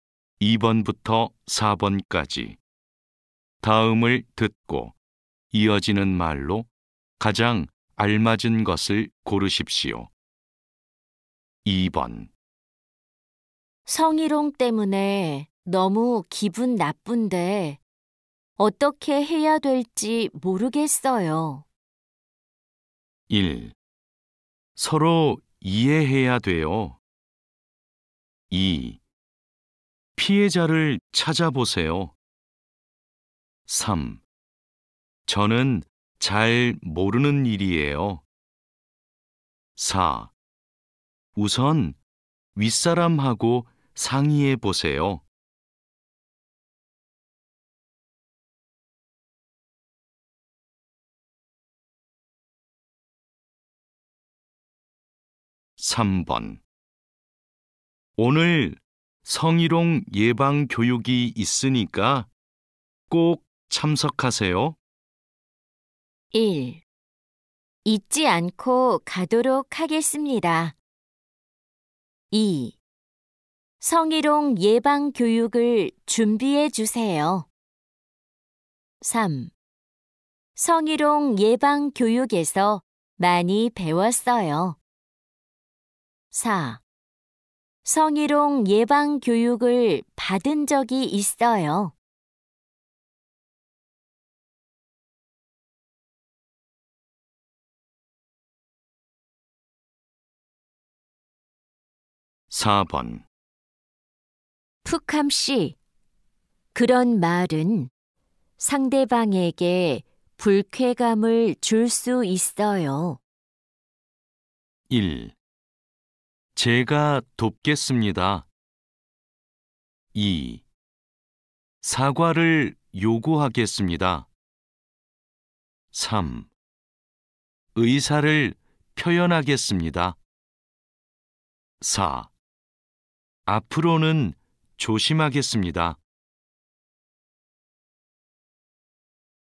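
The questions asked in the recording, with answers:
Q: 성희롱 때문에 너무 기분 나쁜데 어떻게 해야 될지 모르겠어요.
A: 4: 우선 윗사람하고 상의해 보세요.

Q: 오늘 성희롱 예방 교육이 있으니까 꼭 참석하세요.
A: 1: 잊지 않고 가도록 하겠습니다.

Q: 푸캄 씨, 그런 말은 상대방에게 불쾌감을 줄 수 있어요.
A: 4: 앞으로는 조심하겠습니다.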